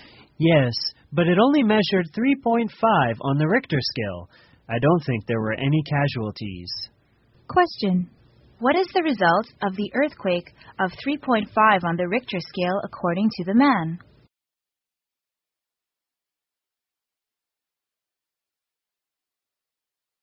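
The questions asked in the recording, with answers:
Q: What is the result of the earthquake of 3.5 on the Richter scale according to the man?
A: There were probably no casualties.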